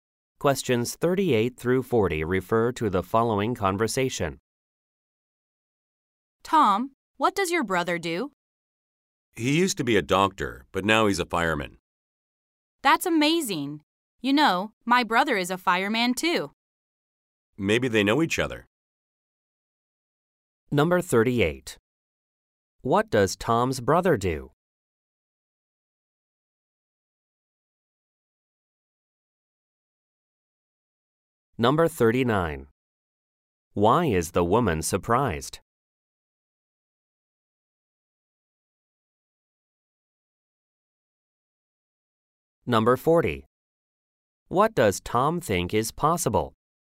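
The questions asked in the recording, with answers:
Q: What does Tom's brother do?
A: He is a fireman

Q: Why is the woman surprised?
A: Her brother is also a fireman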